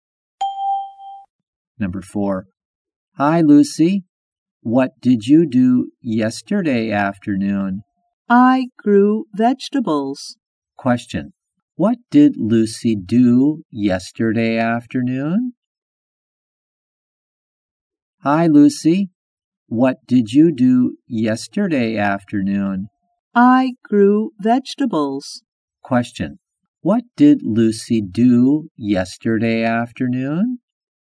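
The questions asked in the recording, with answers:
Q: What did Lucy do yesterday afternoon?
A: She grew vegetables.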